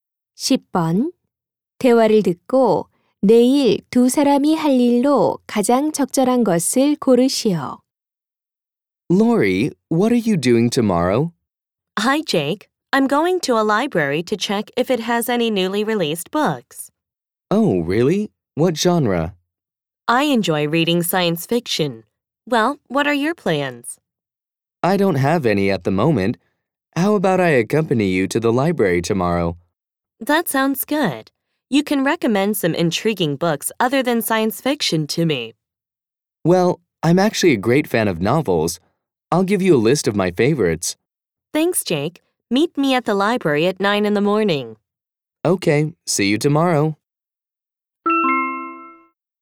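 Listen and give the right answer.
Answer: 도서관에 가기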